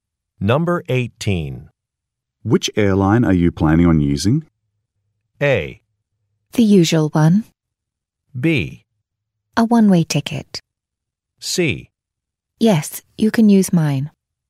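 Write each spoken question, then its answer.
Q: Which airline are you planning on using?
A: A: The usual one.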